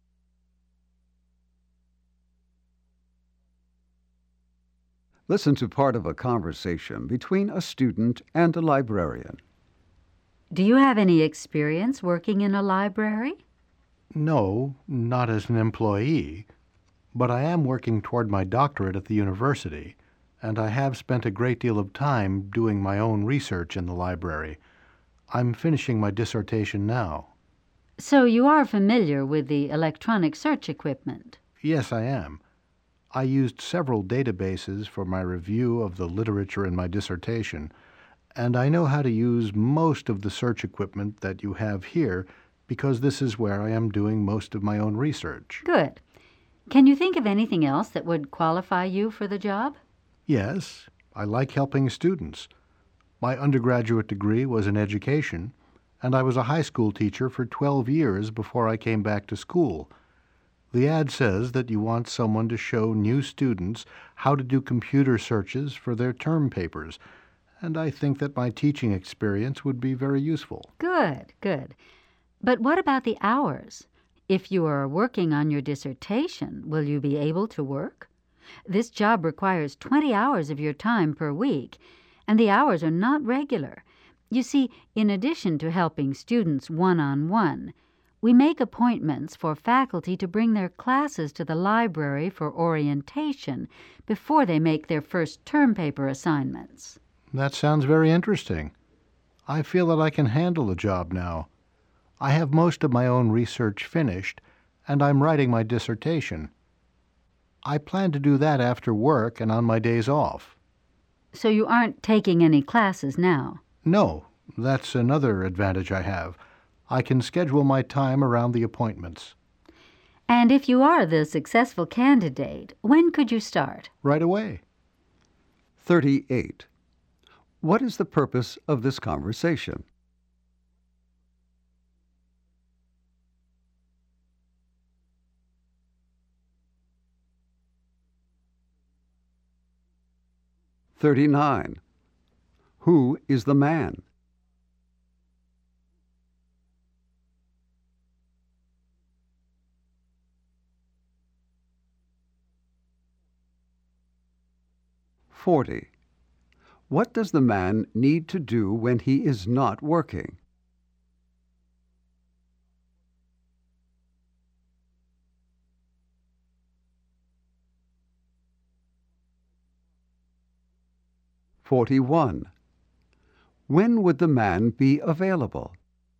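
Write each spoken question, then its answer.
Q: What is the purpose of this conversation?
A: A job interview for a library position

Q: Who is the man?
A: A doctoral student at the university

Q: What does the man need to do when he is not working?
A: Write his dissertation

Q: When would the man be available?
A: Right away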